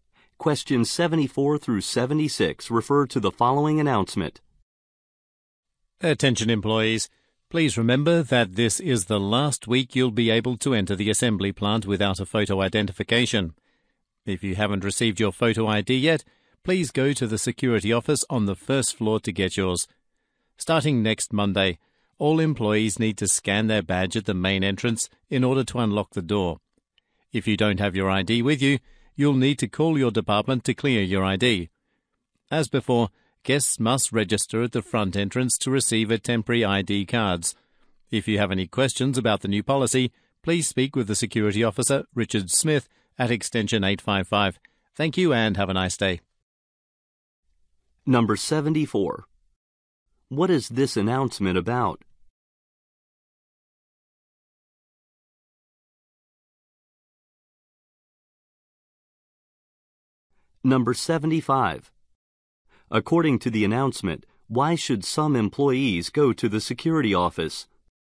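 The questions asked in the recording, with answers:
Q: What is this announcement about?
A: A new photo ID security policy for entering the plant

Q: According to the announcement, why should some employees go to the security office?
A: To get their photo ID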